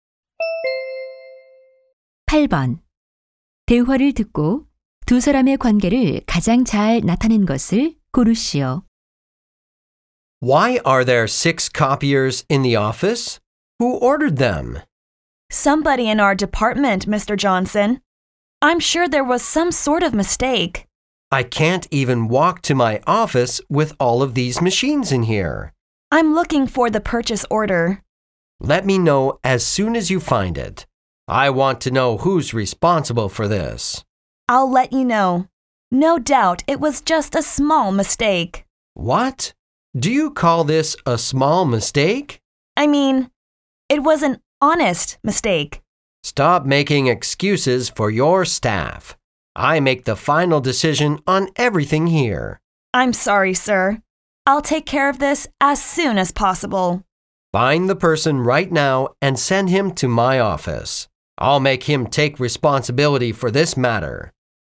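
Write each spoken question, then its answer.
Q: 대화를 듣고 두 사람의 관계를 가장 잘 나타낸 것을 고르시오.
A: 상사와 부하 직원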